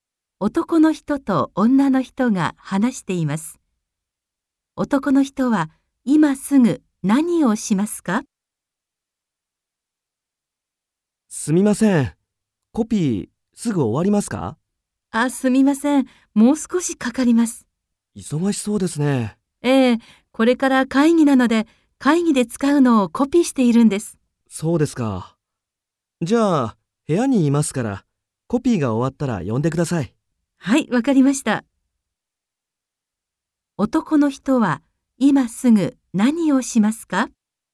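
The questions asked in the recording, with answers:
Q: 男の人は今すぐ何をしますか?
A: 部屋に戻って、コピーが終わるのを待つ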